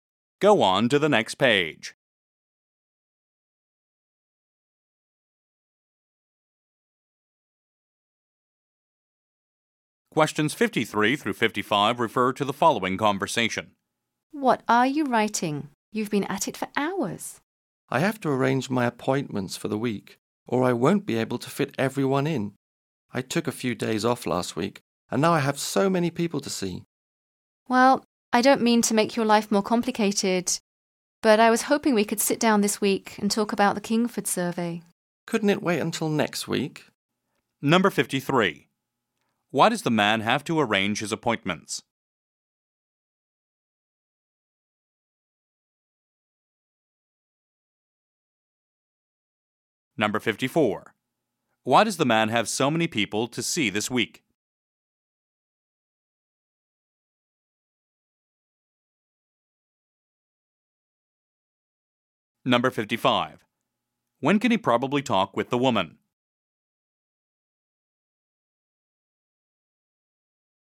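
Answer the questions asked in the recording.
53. So he can fit everyone in
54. He took a few days off last week
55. Next week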